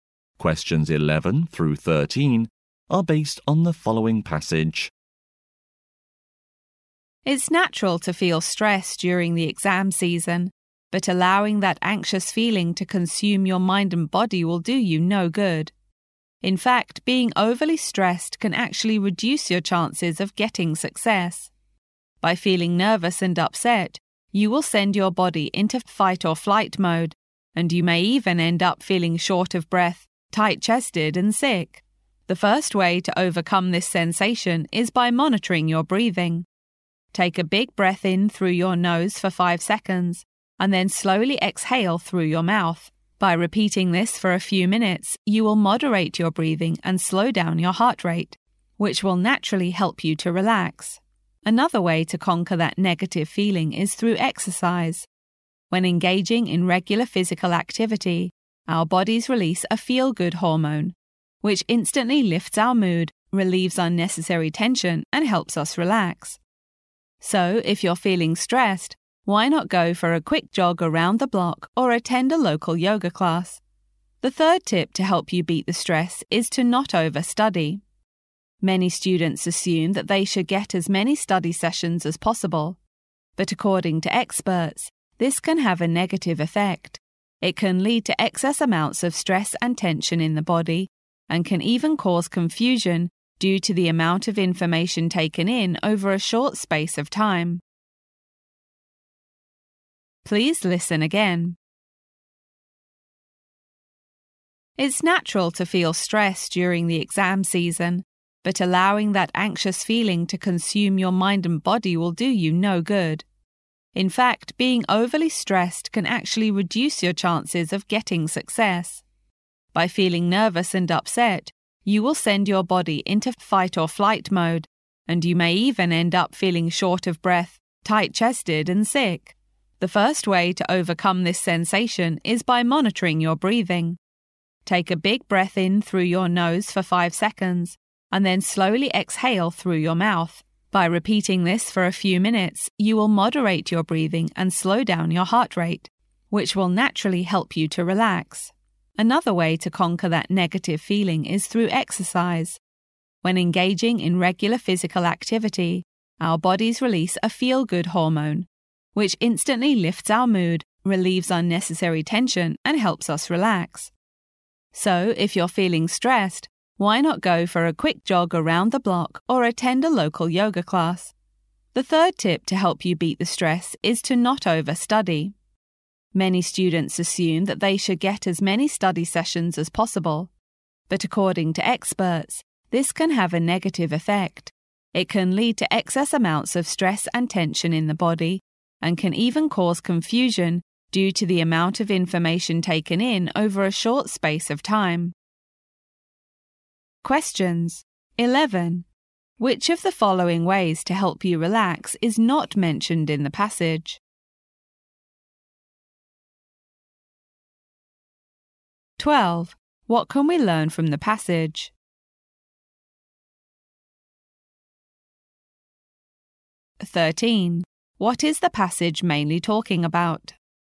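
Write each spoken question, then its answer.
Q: What is the passage mainly talking about?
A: Ways to beat exam stress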